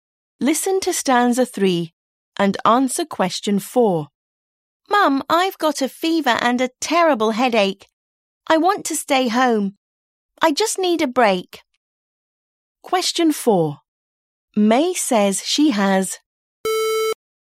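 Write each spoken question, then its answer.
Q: May says she has...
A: a fever and a terrible headache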